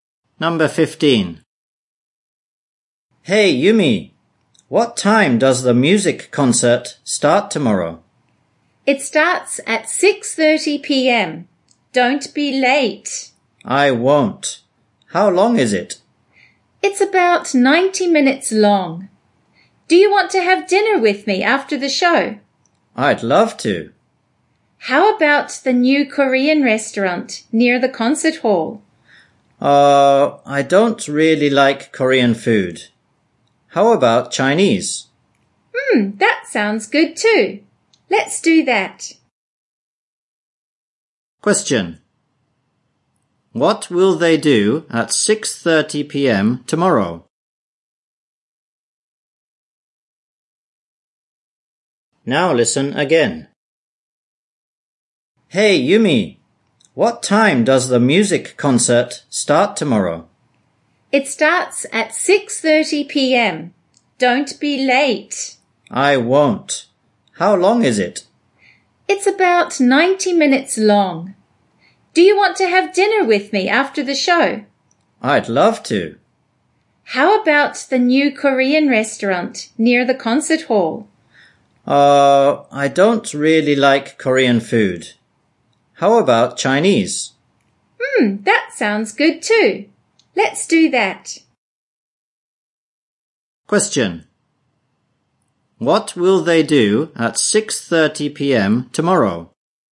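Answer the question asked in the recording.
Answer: Go to the music concert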